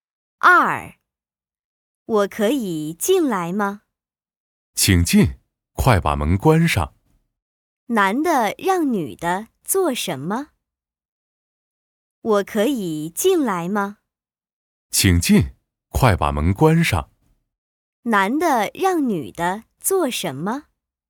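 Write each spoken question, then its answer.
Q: 男的让女的做什么?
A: 把门关上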